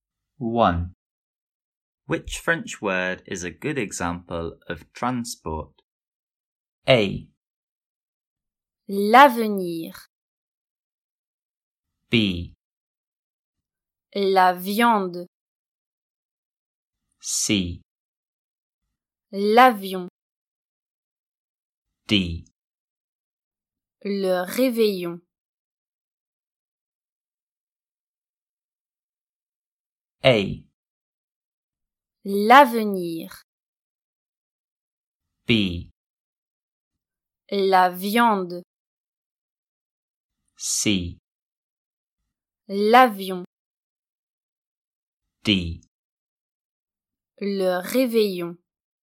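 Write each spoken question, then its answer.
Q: Which French word is a good example of transport?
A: C: L'avion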